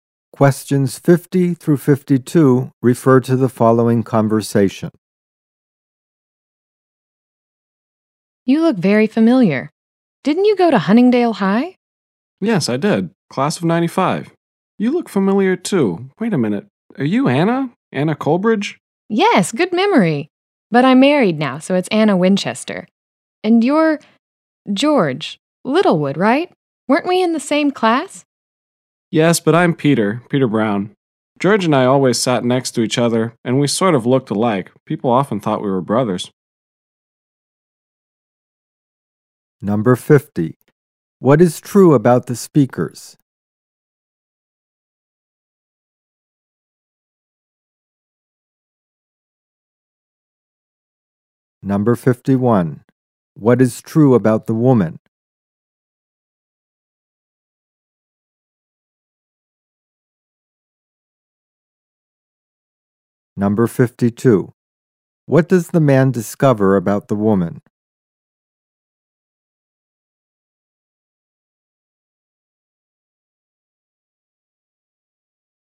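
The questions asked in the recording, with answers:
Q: What is true about the speakers?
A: They went to the same high school, in the same class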